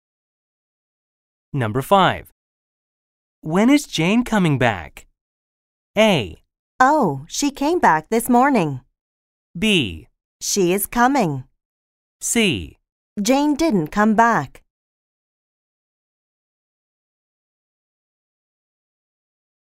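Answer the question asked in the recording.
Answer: A: Oh, she came back this morning.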